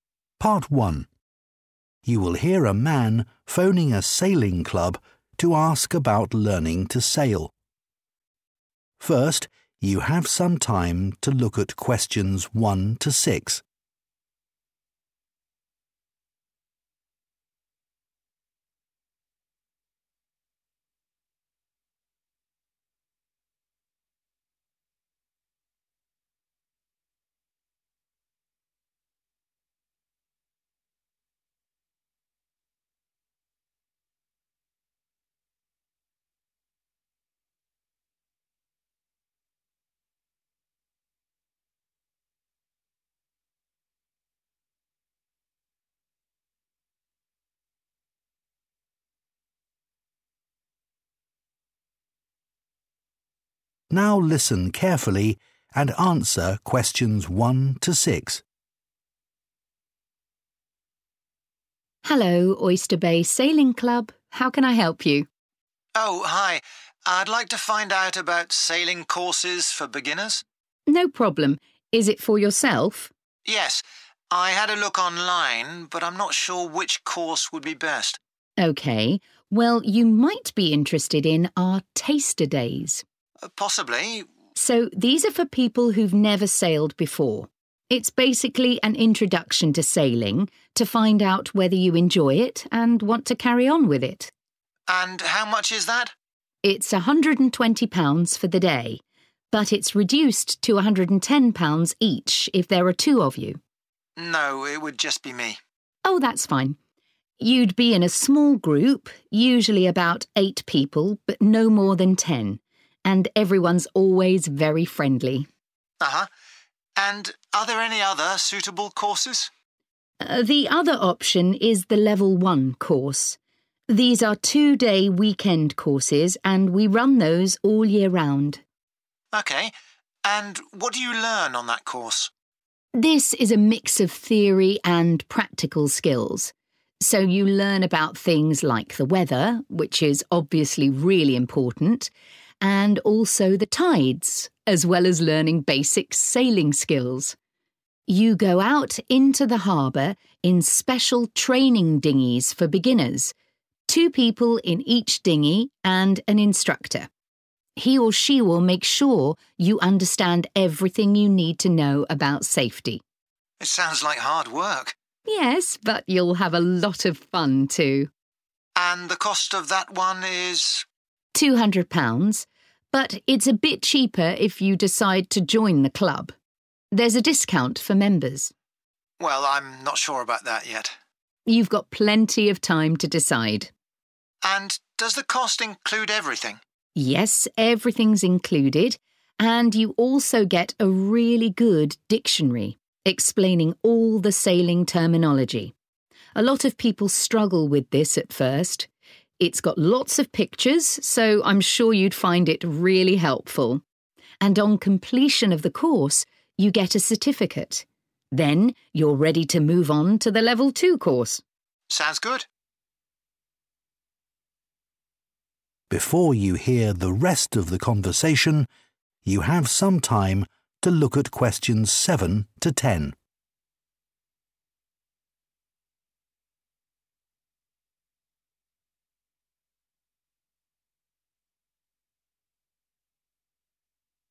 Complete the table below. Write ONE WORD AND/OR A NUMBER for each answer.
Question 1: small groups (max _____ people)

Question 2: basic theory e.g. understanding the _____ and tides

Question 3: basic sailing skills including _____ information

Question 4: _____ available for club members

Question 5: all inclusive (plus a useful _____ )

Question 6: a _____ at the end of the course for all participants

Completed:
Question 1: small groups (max 10 / ten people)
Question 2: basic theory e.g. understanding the weather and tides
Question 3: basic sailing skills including safety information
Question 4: discount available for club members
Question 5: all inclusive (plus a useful dictionary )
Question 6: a certificate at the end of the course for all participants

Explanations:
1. The correct answer is derived from the woman's description of the Taster Day group size. She states that the groups are small. While they typically have eight people, she specifies that they have "no more than ten." In the table, the word "max" is a synonym for the phrase "no more than," showing that ten is the upper limit for participants.
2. The correct answer is "weather" because the woman explains that the Level 1 course teaches both ideas ("theory") and activities ("practical skills"). In the lesson part, she specifically mentions that students learn about the weather and the tides together, as these are both very important for sailing safely.
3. The correct answer is 'safety' because the woman explains that during the Level 1 course, a teacher (instructor) will go out on the boat with you. This person will teach you all the important things you must know to stay away from danger while sailing. Keywords like 'understand everything you need to know' point to 'safety' as the specific topic being taught.
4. The correct answer is based on the woman's explanation about the Level 1 course. After saying the price is £200, she explains that people can pay less if they join the club. She uses the word "discount" to describe this lower price for members. In many businesses, a "discount" is a way to make things "cheaper" for loyal customers or members.
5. The correct answer is dictionary because the woman states that besides the cost covering all essential items, participants also receive a 'really good dictionary' specifically for explaining 'sailing terminology' (special words used in sailing). This matches the table's note about an 'all inclusive' cost that comes with a 'useful' item.
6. The correct answer is "certificate" because the woman explains that students receive this document after finishing the Level 1 course. She says that once you have this, you will be prepared for the harder Level 2 course. Other keywords related to this are "completion," which means finishing something, and "move on," which means going to the next step.

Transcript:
WOMAN: Hello, Oyster Bay Sailing Club. How can I help you?
MAN: Oh hi. I'd like to find out about sailing courses for beginners.
WOMAN: No problem. Is it for yourself?
MAN: Yes. I had a look online but I'm not sure which course would be best.
WOMAN: OK. Well you might be interested in our Taster Days?
MAN: Possibly.
WOMAN: So these are for people who've never sailed before - it's basically an introduction to sailing to find out whether you enjoy it and want to carry on with it.
MAN: And how much is that?
WOMAN: It's £120 for the day - but it's reduced to £110 each if there are two of you.
MAN: No, it would just be me.
WOMAN: Oh that's fine. You'd be in a small group, usually about eight people but no more than ten - and everyone's always very friendly.
MAN: Uh huh. And are there any other suitable courses?
WOMAN: The other option is the Level 1 course. These are two-day weekend courses and we run those all year round.
MAN: OK. And what do you learn on that course?
WOMAN: This is a mix of theory and practical skills. So you learn about things like the weather, which is obviously really important and also the tides, as well as learning basic sailing skills. You go out into the harbour in special training dinghies for beginners, two people in each dinghy and an instructor. He or she will make sure you understand everything you need to know about safety.
MAN: It sounds like hard work!
WOMAN: Yes, but you'll have a lot of fun too.
MAN: And the cost of that one is ... ?
WOMAN: £200. But it's a bit cheaper if you decide to join the club. There's a discount for members.
MAN: Well, I'm not sure about that yet.
WOMAN: You've got plenty of time to decide.
MAN: And does the cost include everything?
WOMAN: Yes, everything's included and you also get a really good dictionary explaining all the sailing terminology. A lot of people struggle with this at first. It's got lots of pictures, so I'm sure you'd find it really helpful. And on completion of the course you get a certificate. Then you're ready to move on to the Level 2 course.
MAN: Sounds good.